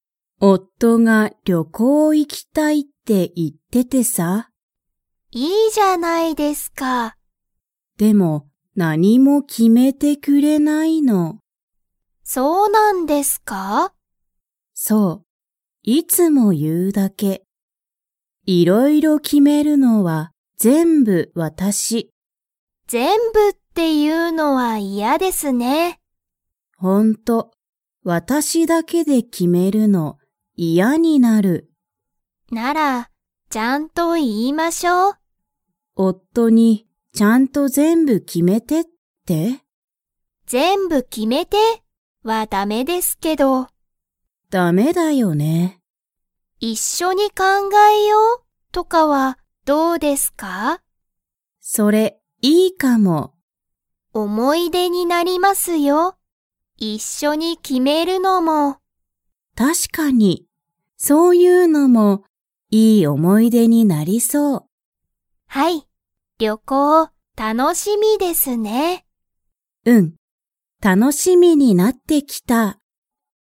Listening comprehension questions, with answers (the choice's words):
Comprehension Quiz (Skip if you don't understand the conversation yet)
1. さきの夫おっとは、何なにをしたいですか?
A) 仕事しごと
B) 旅行りょこう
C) 思おもい出で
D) 学校がっこう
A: 旅行りょこう

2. さきは、旅行りょこうが楽たのしみに 。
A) なってきた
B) なってない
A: なってきた

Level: Level 3